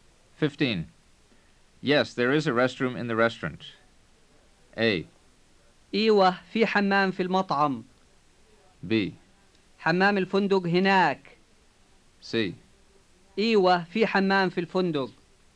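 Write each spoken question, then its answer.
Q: Yes, there is a restroom in the restaurant.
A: A: إيوه في حمام في المطعم.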